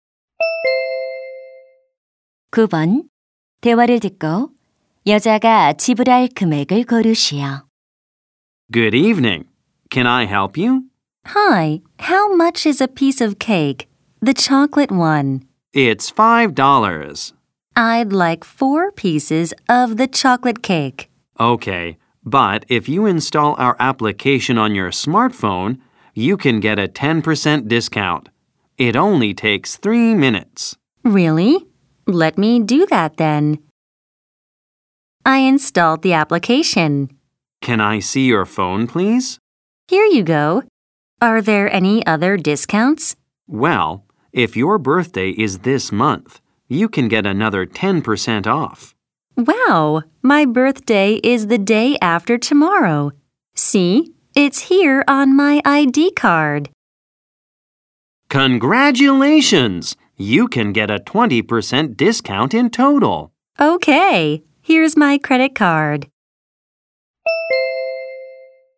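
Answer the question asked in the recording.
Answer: $16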